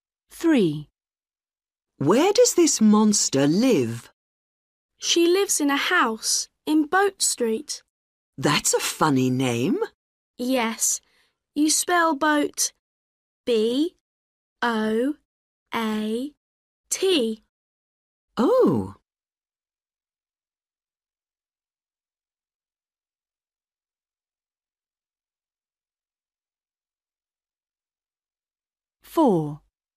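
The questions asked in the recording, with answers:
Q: Where does this monster live?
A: Boat Street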